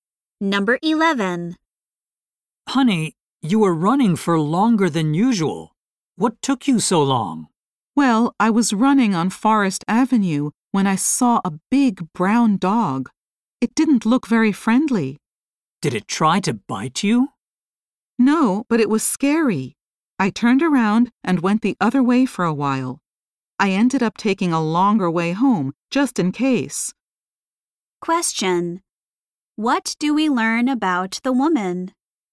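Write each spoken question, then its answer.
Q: What do we learn about the woman?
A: She took a longer way home to avoid a scary dog.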